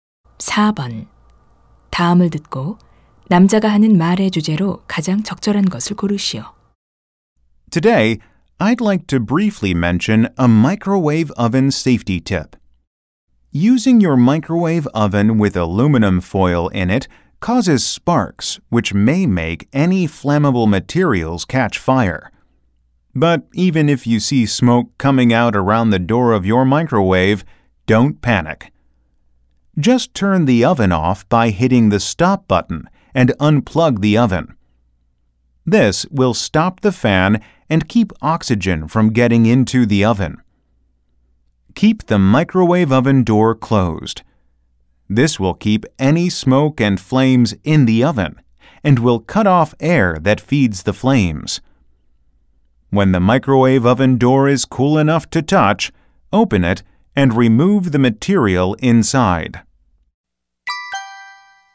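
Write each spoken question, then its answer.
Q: 다음을 듣고 남자가 하는 말의 주제로 가장 적절한 것을 고르시오.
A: 전자레인지 화재 시 안전 대처 요령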